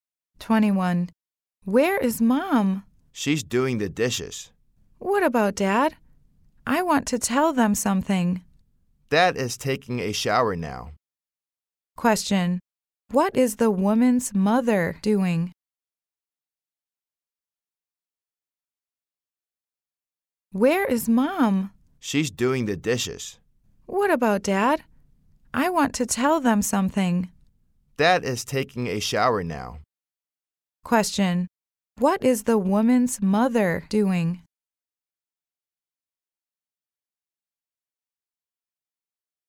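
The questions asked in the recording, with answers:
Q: Question. What is the woman's mother doing?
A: Doing the dishes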